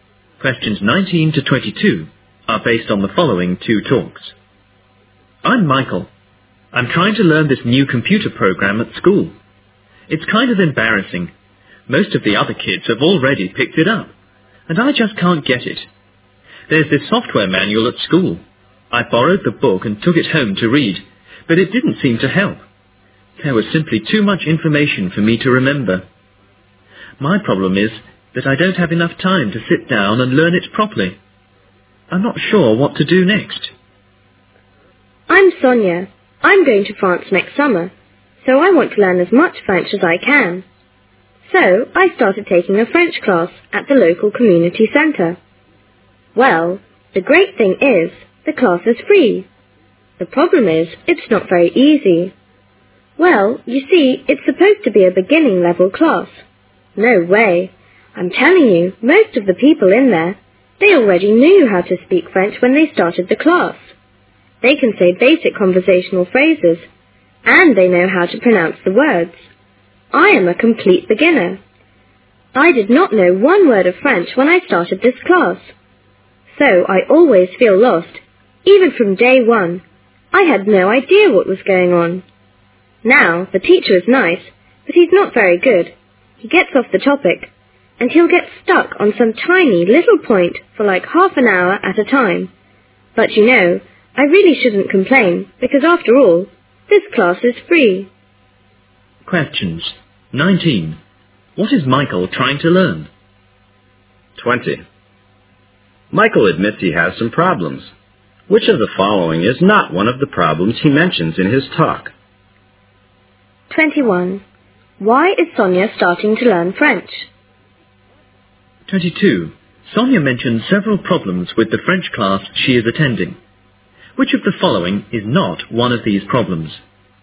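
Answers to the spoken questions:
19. A new computer program
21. She is going to France next summer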